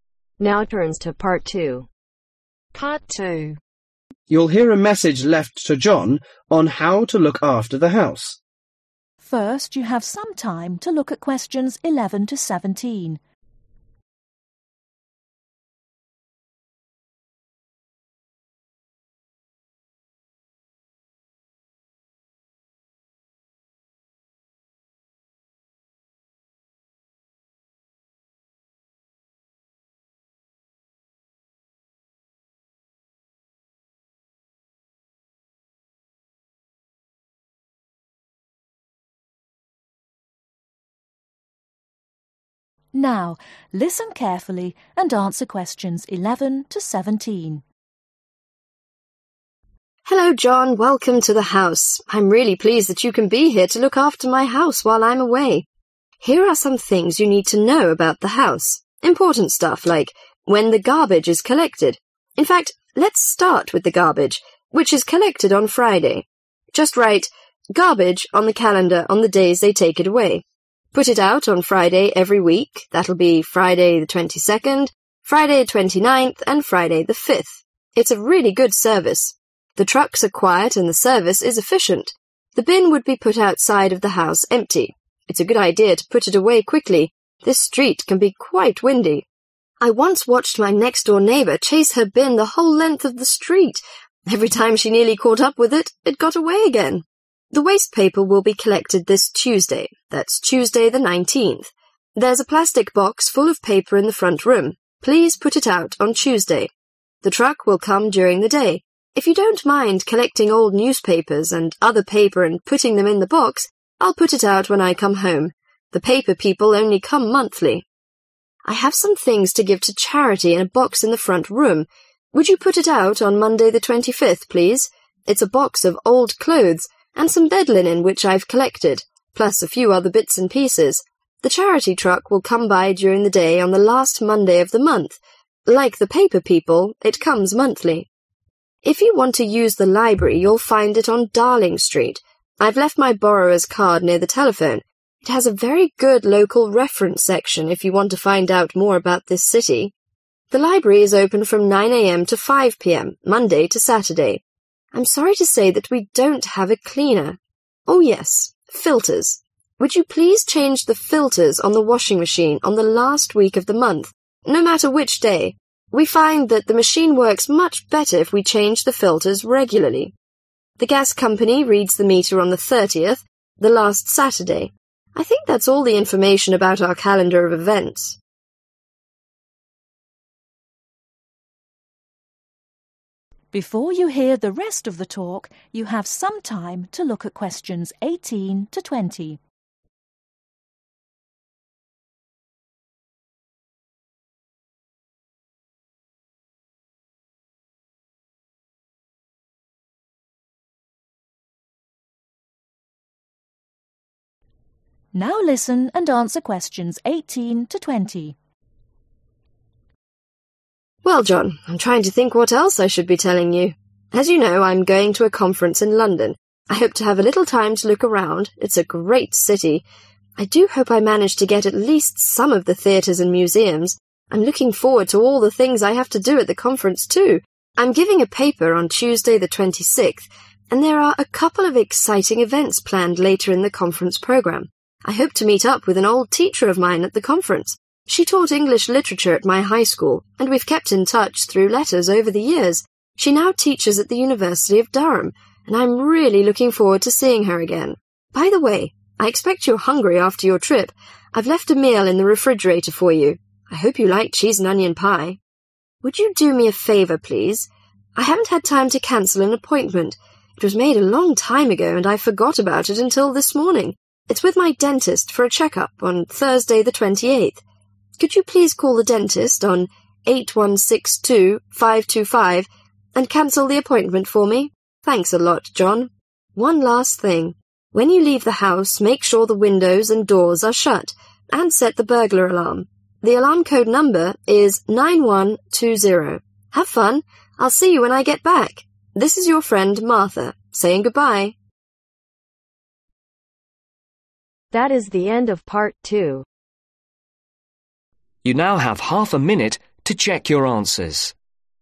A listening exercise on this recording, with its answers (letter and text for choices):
Circle the correct letter.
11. The lady ask John to write "garbage" on the calendar on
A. three consecutive Fridays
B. the 5th Friday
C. each Friday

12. The lady suggests John to put the bin away quickly because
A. it can block the street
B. it may be blown away by wind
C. the neighbor may complain about it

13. the waste paper is collected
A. each Tuesday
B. everyday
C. once a month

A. the last Saturday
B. once a month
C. the whole last week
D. not on Sunday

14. the charity truck ............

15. the library ............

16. to change the filters ............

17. the gas company ............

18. The lady is going to London for a ............ .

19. The lady asks John to call the dentist to ............ .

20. The lady remind John to shut the door and windows and ............ .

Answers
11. A. three consecutive Fridays
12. B. it may be blown away by wind
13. C. once a month
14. B. once a month
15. D. not on Sunday
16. C. the whole last week
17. A. the last Saturday
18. Conference
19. cancel the appointment
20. set burglar alarm